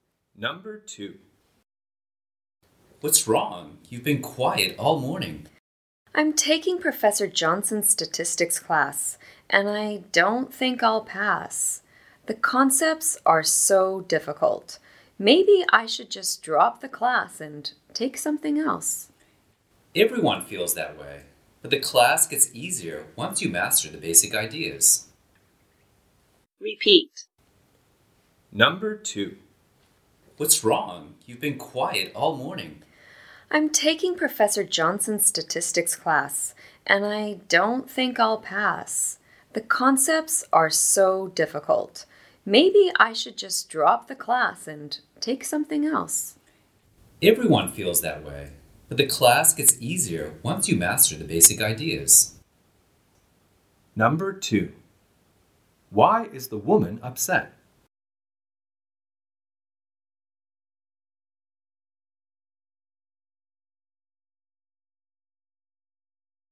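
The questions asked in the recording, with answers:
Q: Why is the woman upset?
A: She finds her statistics class difficult and thinks she won't pass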